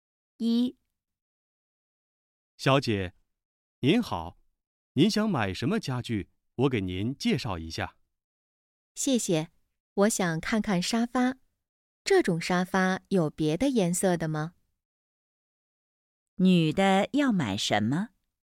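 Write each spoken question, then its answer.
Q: 女的要买什么?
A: 沙发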